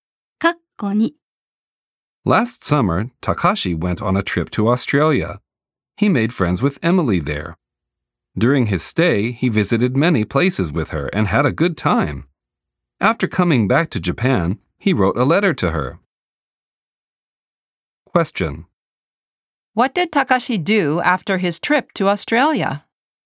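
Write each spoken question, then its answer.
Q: What did Takashi do after his trip to Australia?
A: He wrote a letter to Emily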